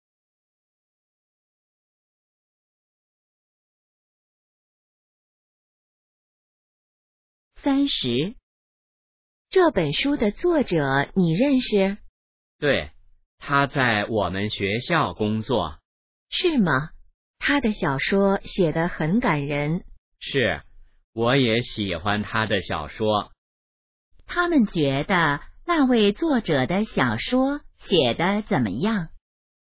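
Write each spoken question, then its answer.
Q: 他们觉得那位作者的小说写得怎么样?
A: 很感人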